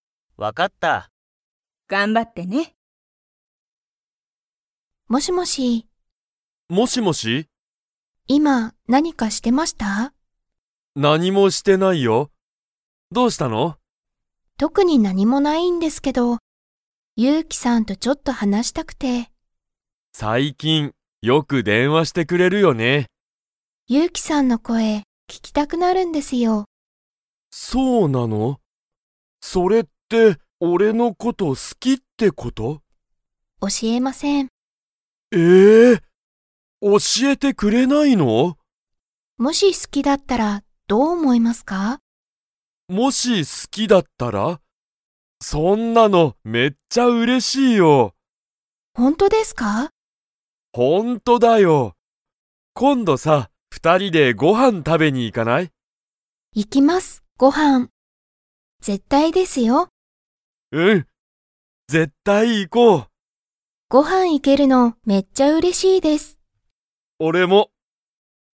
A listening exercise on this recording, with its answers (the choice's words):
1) ゆうきは、今何(いまなに)かしていましたか?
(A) はい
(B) いいえ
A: いいえ

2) さくらは、____よく、ゆうきに電話(でんわ)する。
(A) 最近(さいきん)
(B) 今度(こんど)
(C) あまり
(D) 休(やす)みに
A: 最近(さいきん)